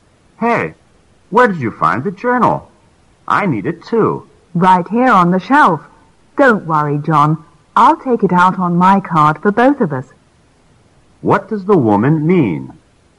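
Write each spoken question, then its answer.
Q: What does the woman mean?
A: She will check the journal out on her card so both of them can use it.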